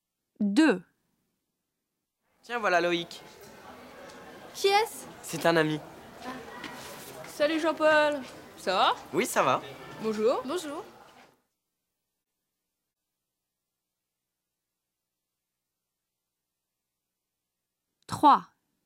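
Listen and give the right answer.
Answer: un ami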